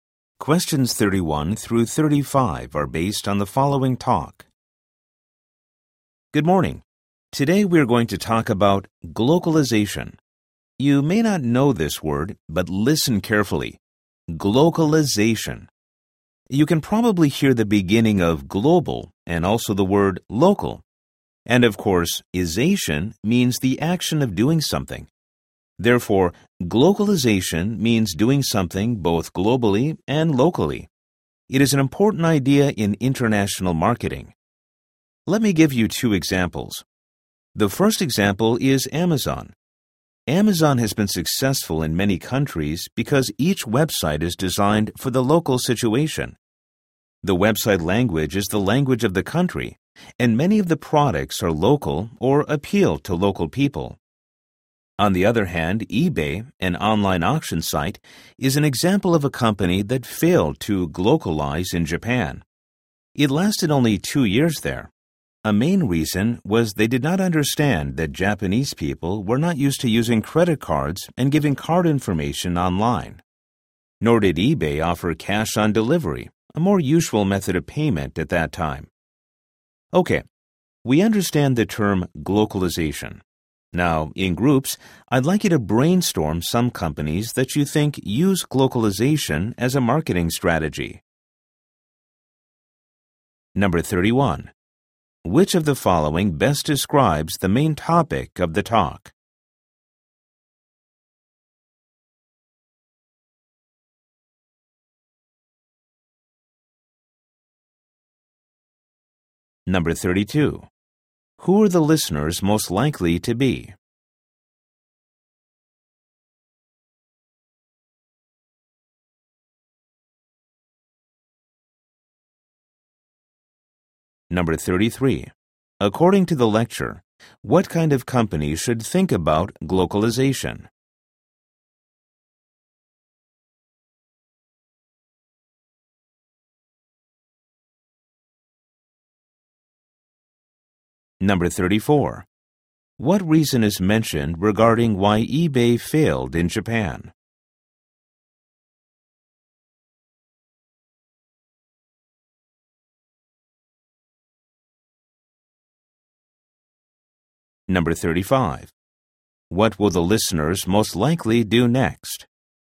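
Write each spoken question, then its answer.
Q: Which of the following best describes the main topic of the talk?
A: Glocalization in international marketing

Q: What reason is mentioned regarding why eBay failed in Japan?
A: Japanese people weren't used to using credit cards online, and no cash on delivery

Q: What will the listeners most likely do next?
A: Brainstorm in groups companies that use glocalization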